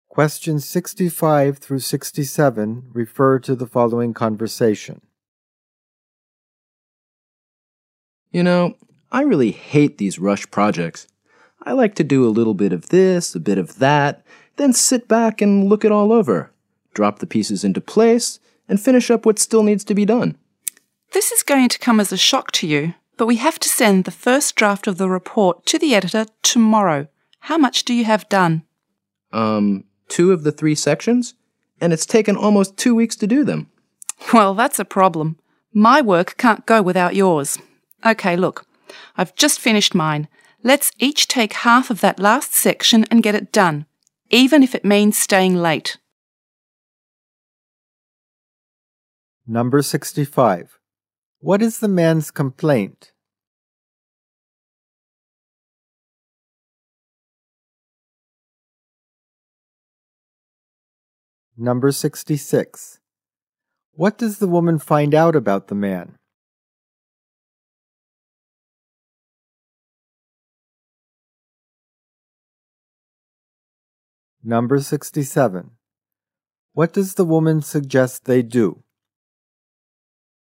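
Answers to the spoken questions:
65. He dislikes rush projects.
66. He has finished only two of the three sections.
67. Each take half of the last section and finish it, even staying late.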